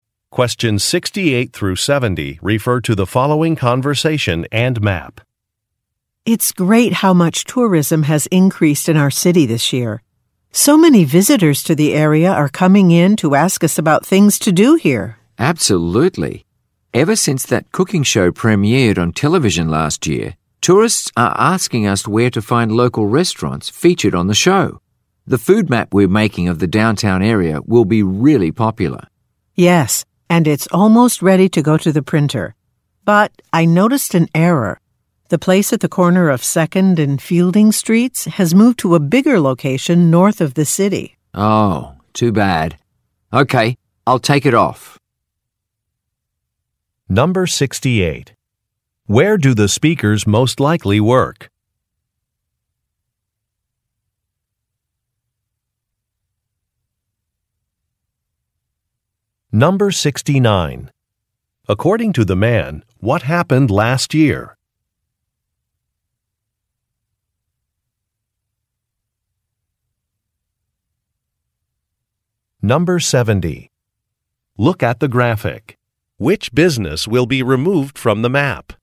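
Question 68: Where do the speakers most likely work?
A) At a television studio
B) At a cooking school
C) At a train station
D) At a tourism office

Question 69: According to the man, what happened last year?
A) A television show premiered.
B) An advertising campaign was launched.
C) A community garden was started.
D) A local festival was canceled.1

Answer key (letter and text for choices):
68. D) At a tourism office
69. A) A television show premiered.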